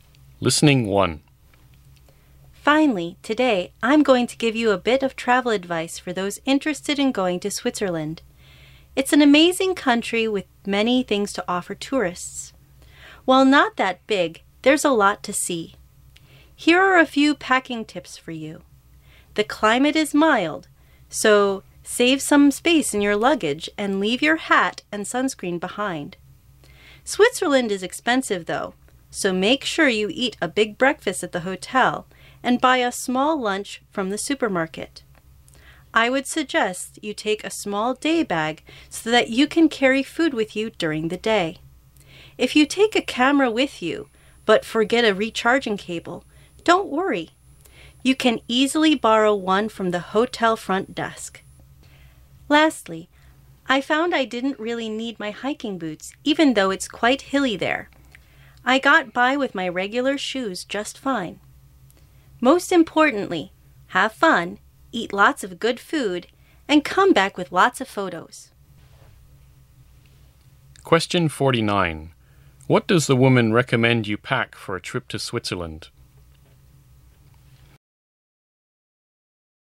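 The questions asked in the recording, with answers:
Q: What does the woman recommend you pack for a trip to Switzerland?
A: A small day bag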